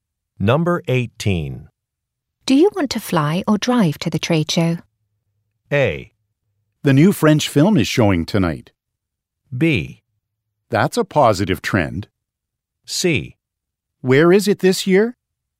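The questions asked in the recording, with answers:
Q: Do you want to fly or drive to the trade show?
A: C: Where is it this year?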